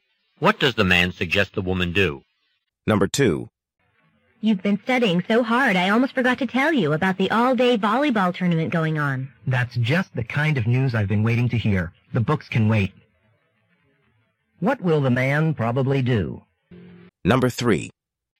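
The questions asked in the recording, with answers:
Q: What will the man probably do?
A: Go to the volleyball tournament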